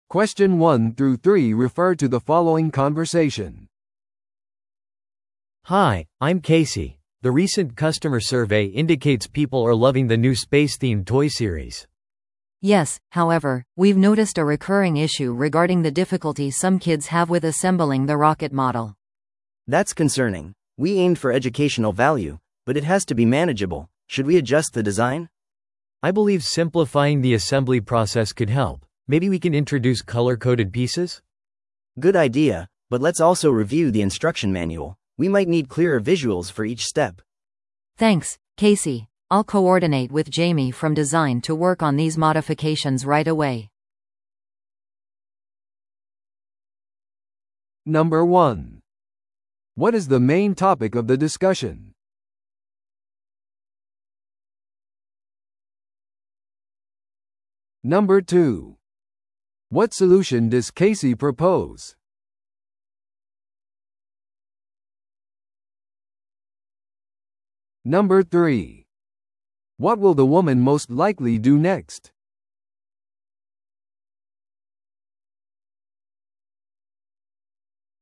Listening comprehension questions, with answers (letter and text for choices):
Listen to the audio below and answer the questions.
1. What is the main topic of the discussion?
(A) 新しい子供のおもちゃに対する顧客のフィードバック。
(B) 最新の宇宙テーマのゲームに関する調査。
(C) 新しい教育プログラムの開発。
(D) おもちゃのプロモーションのためのマーケティング戦略。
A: (A) 新しい子供のおもちゃに対する顧客のフィードバック。

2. What solution does Casey propose?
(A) 別の顧客調査を実施する。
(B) ロケットモデルの組み立てを簡素化する。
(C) おもちゃシリーズの価格を上げる。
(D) 宇宙テーマのおもちゃシリーズを中止する。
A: (B) ロケットモデルの組み立てを簡素化する。

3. What will the woman most likely do next?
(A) 取扱説明書に関するレポートを準備する。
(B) ジェイミーと協力してデザイン変更を行う。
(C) 子供たちを対象としたフォーカスグループを組織する。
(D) おもちゃシリーズの広告キャンペーンを開始する。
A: (B) ジェイミーと協力してデザイン変更を行う。

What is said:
A: Hi, I'm Casey. The recent customer survey indicates people are loving the new space-themed toy series!
B: Yes, however, we've noticed a recurring issue regarding the difficulty some kids have with assembling the rocket model.
C: That's concerning. We aimed for educational value, but it has to be manageable. Should we adjust the design?
A: I believe simplifying the assembly process could help. Maybe we can introduce color-coded pieces?
C: Good idea, but let's also review the instruction manual. We might need clearer visuals for each step.
B: Thanks, Casey. I'll coordinate with Jamie from design to work on these modifications right away.